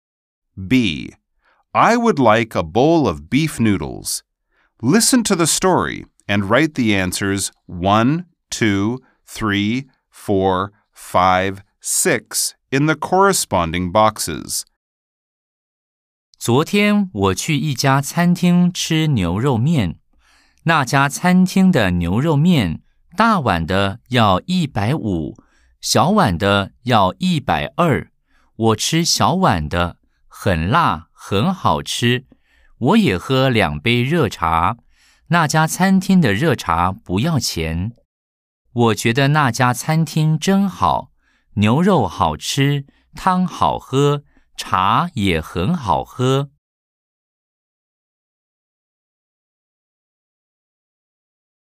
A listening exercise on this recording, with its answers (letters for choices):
Nghe câu chuyện và viết câu trả lời 1, 2, 3, 4, 5, 6 vào ô tương ứng.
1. 小碗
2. 大碗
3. 一百二十塊錢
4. 二十塊錢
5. 不要錢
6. 一百五十塊錢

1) 我吃大碗還是小碗牛肉麵?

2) 我的牛肉麵多少錢?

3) 茶和牛肉麵一共多少錢?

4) 兩杯茶多少錢?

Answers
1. 1
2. 3
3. 3
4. 5